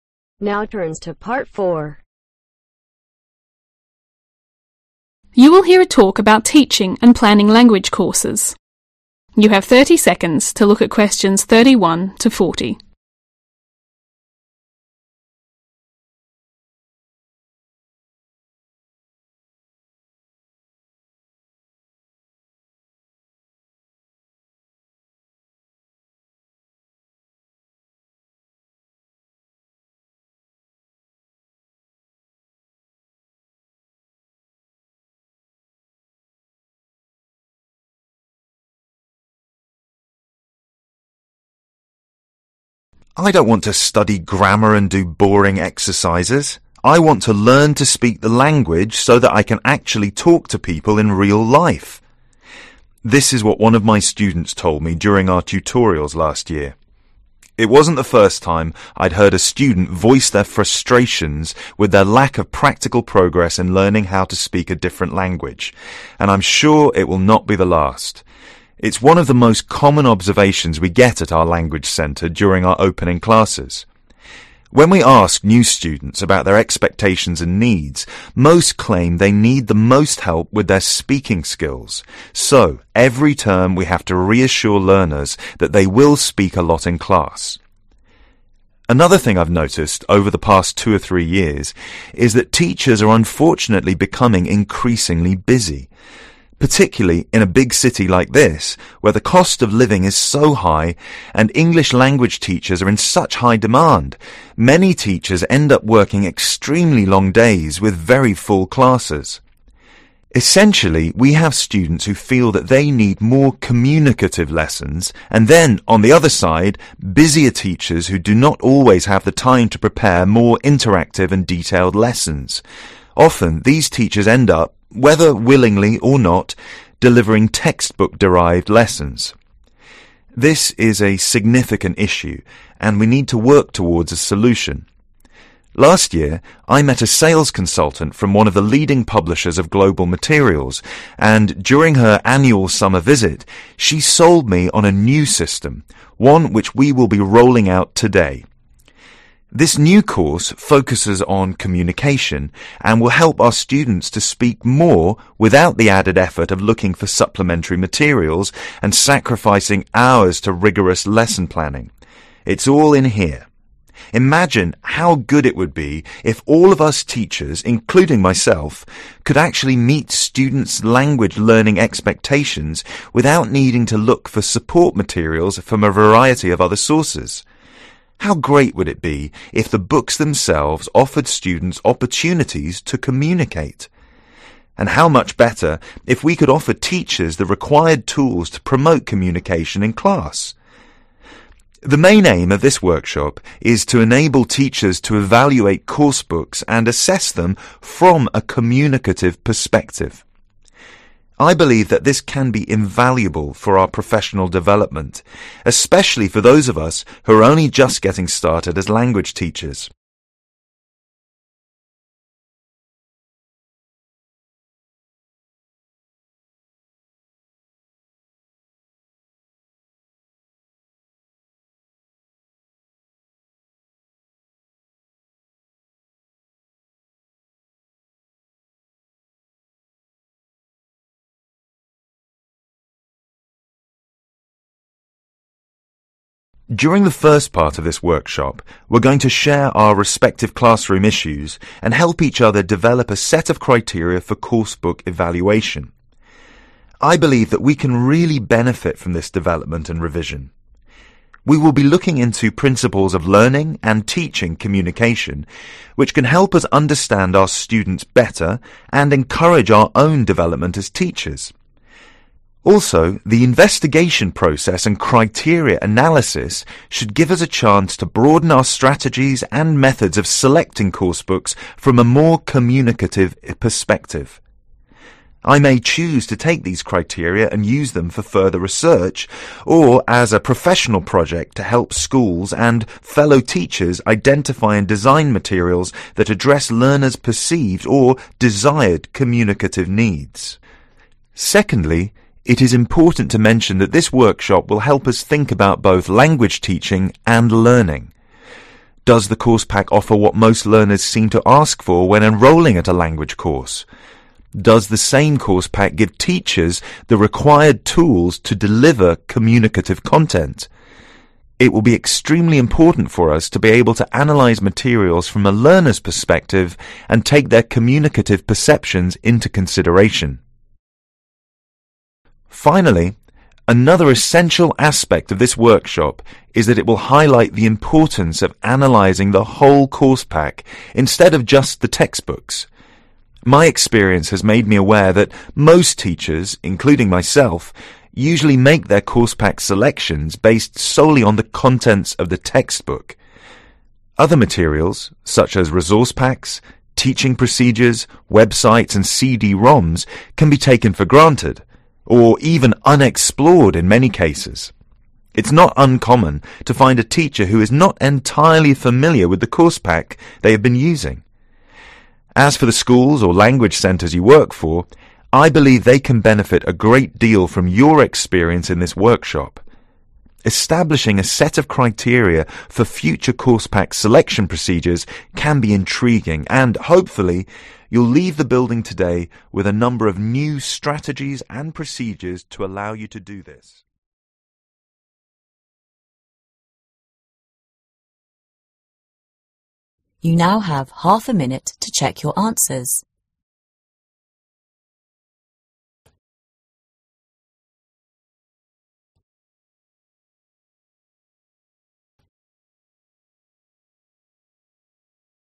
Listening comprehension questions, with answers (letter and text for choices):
Write NO MORE THAN THREE WORDS for each answer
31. is the lack of ...................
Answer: practical progress

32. Many students believe they need to improve their ..................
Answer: speaking (skills)

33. Teachers are getting ....................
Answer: increasingly busy

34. As a result, these teachers may not be able to plan more .................. classes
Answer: interactive and detailed

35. The new system was presented by a saleswoman from a .................. of global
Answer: leading publisher

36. The workshop's aim is to .................... to evaluate and assess course books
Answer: to enable teachers

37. In the first part of the workshop, participants will help each other to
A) evaluate a new course book together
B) develop a set of standards to assess course book with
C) assess a set of course book criteria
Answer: B) develop a set of standards to assess course book with

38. The speaker may use the information gained from the first part of the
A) carry out additional research or help more schools and teachers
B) research the selected criteria further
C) helps schools select the proper teachers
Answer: A) carry out additional research or help more schools and teachers

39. The workshop will also enable teacher to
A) take the material perspectives into account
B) analyse learner's communicative considerations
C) look at the resources from the students's point of view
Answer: C) look at the resources from the students's point of view

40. The speaker believes that most teachers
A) choose materials bases in all contents of a course book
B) choose materials based on contents of text books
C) choose materials based on their language centres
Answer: B) choose materials based on contents of text books